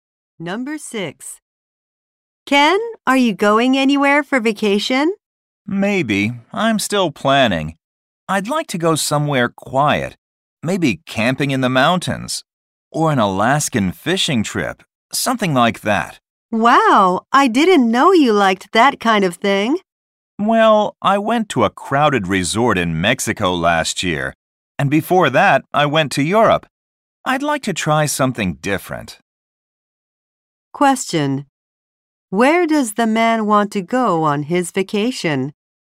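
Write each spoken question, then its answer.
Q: Where does the man want to go on his vacation?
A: Somewhere quiet, like the mountains or Alaska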